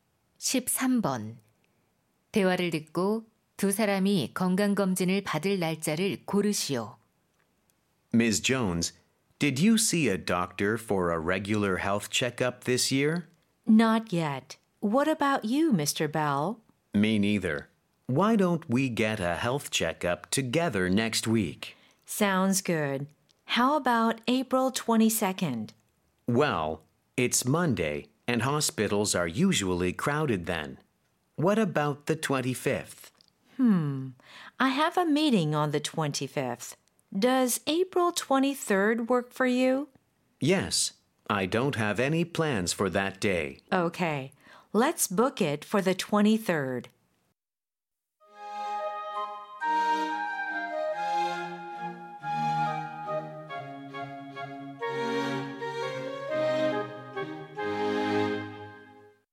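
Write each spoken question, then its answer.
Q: 대화를 듣고 두 사람이 건강검진을 받을 날짜를 고르시오.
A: 4월 23일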